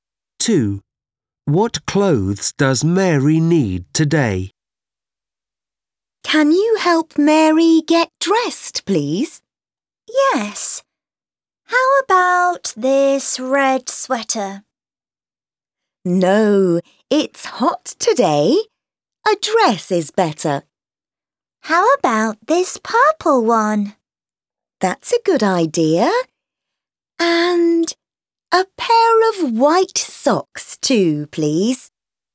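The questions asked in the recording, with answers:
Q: What clothes does Mary need today?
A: A purple dress and a pair of white socks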